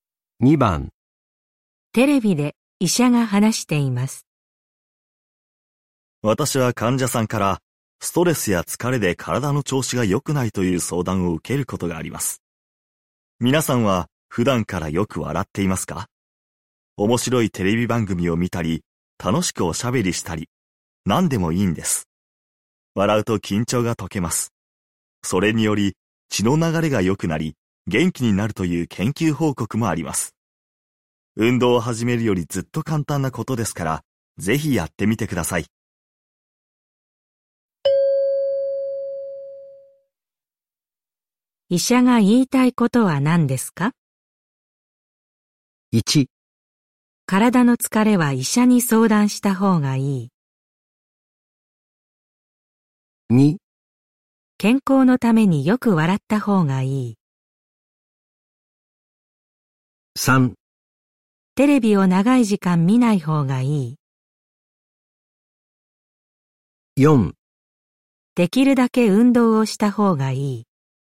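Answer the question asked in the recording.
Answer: 2: 健康のためによく笑った方がいい。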